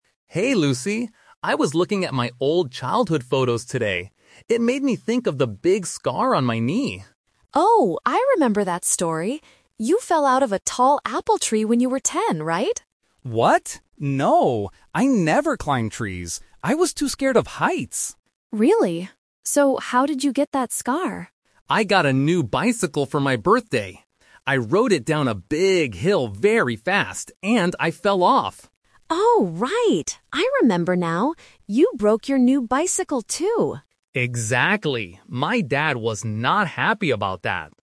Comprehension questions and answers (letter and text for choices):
Listen to two friends, Tom and Lucy, talking on the phone about a childhood memory. Then, read the questions below and choose the correct answer (A, B, or C) for each question.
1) How did Tom get the scar on his knee?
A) He fell out of an apple tree.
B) He fell off his bicycle.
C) He fell down the stairs.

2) Why didn't Tom climb trees when he was a child?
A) He didn't like apples.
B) His dad was angry.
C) He was scared of heights.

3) What happened to Tom's new bicycle?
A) It was broken.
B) It was stolen.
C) It was lost on the hill.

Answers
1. B) He fell off his bicycle.
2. C) He was scared of heights.
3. A) It was broken.

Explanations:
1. Tom explains the real story by saying, "I rode it down a big hill very fast, and I fell off." Option (A) is a trap; Lucy thought he fell out of an apple tree, but she remembered the wrong story. Option (C) is a plausible accident, but it is never mentioned in the audio.
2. Tom clearly says, "I never climbed trees. I was too scared of heights!" Option (A) is a trap; an apple tree is mentioned, but he didn't climb it because of heights, not because he disliked apples. Option (B) is a trap; his dad was angry later because the bike was broken, not because of climbing trees.
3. Lucy remembers correctly at the end and says, "You broke your new bicycle, too," and Tom agrees ("Exactly"). Option (B) and Option (C) are plausible bad things that can happen to a bike, but they are not mentioned in the conversation.

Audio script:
Tom: Hey Lucy! I was looking at my old childhood photos today. It made me think of the big scar on my knee.
Lucy: Oh, I remember that story! You fell out of a tall apple tree when you were ten, right?
Tom: What? No! I never climbed trees. I was too scared of heights!
Lucy: Really? So how did you get that scar?
Tom: I got a new bicycle for my birthday. I rode it down a big hill very fast, and I fell off.
Lucy: Oh, right! I remember now. You broke your new bicycle, too.